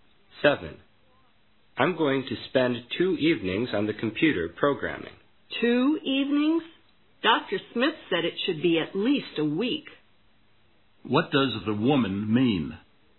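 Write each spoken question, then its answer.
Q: What does the woman mean?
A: Two evenings is not enough; it will take at least a week.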